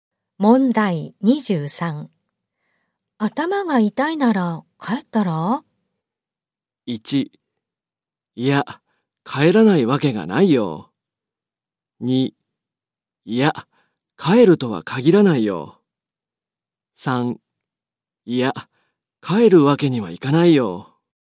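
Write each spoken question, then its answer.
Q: 頭が痛いなら帰ったら?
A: 3: いや、帰るわけにはいかないよ。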